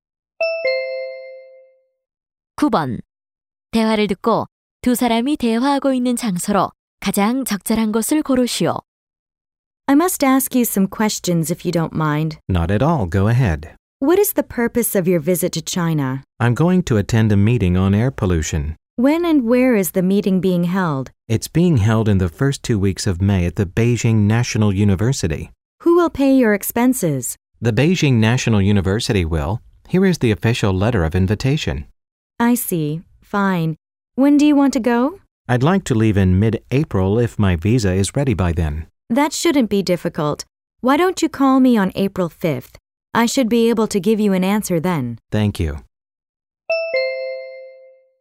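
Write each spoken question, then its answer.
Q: 대화를 듣고 두 사람이 대화하고 있는 장소로 가장 적절한 곳을 고르시오.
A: 대사관 (비자 발급 창구)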